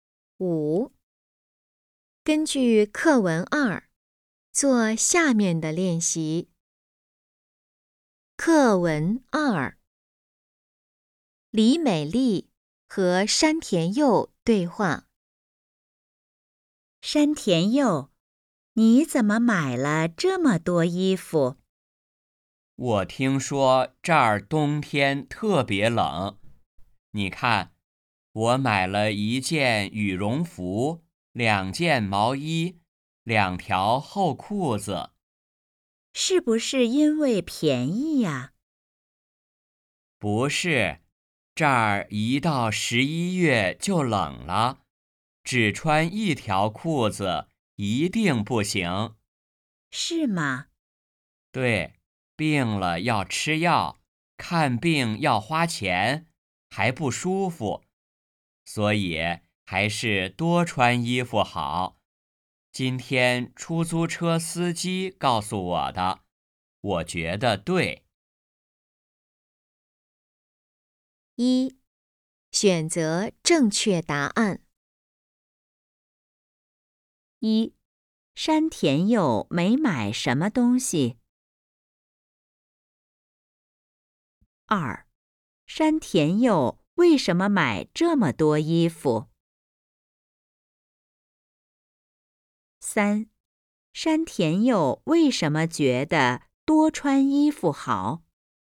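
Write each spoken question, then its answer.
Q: 山田佑为什么买这么多衣服?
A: 因为他听说这儿冬天特别冷

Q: 山田佑为什么觉得多穿衣服好?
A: 因为病了要吃药,看病要花钱,还不舒服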